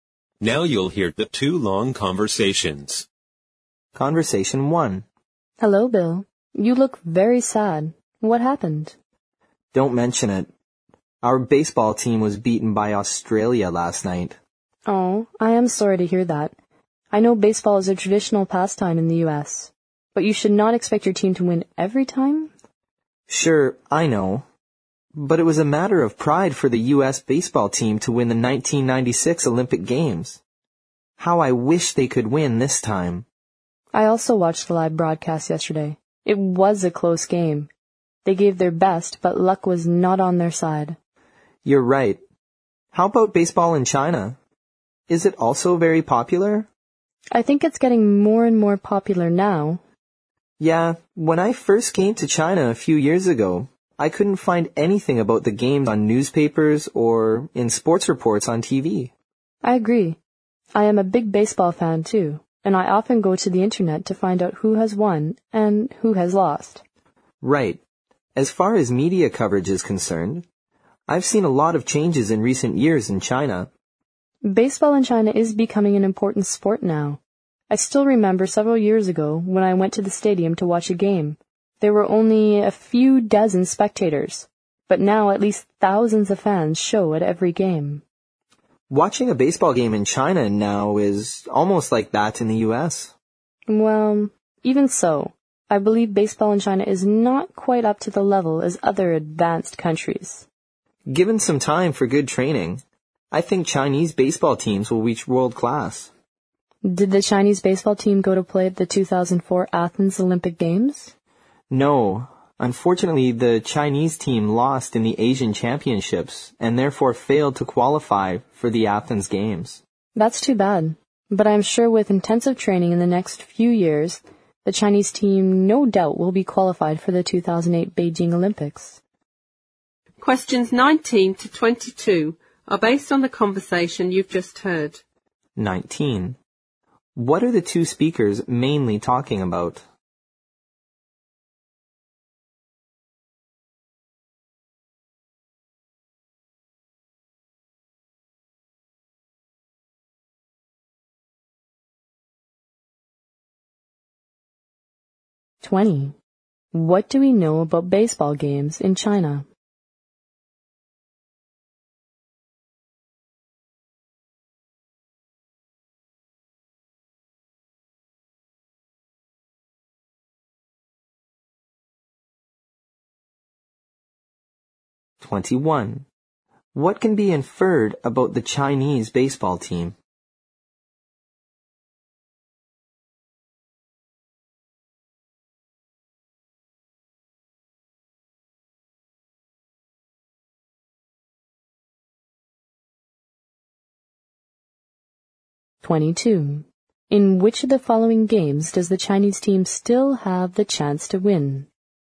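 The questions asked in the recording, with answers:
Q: What are the two speakers mainly talking about?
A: Baseball (in China and the U.S.)

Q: What do we know about baseball games in China?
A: They are getting more and more popular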